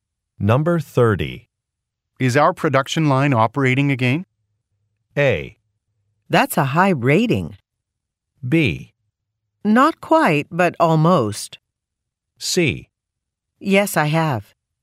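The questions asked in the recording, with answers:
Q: Is our production line operating again?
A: B: Not quite, but almost.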